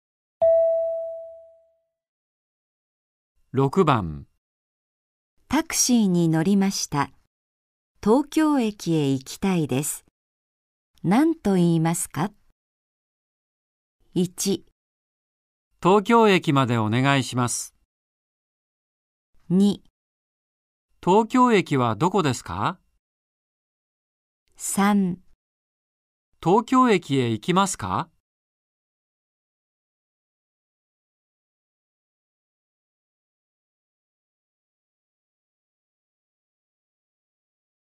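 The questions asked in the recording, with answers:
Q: タクシーに乗りました。東京駅へ行きたいです。何と言いますか?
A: 1: 東京駅までお願いします。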